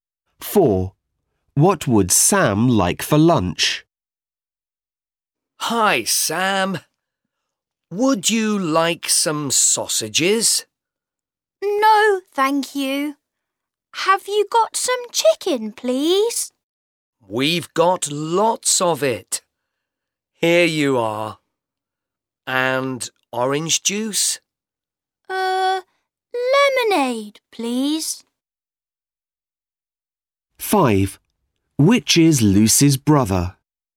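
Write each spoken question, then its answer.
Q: What would Sam like for lunch?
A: Chicken (and lemonade)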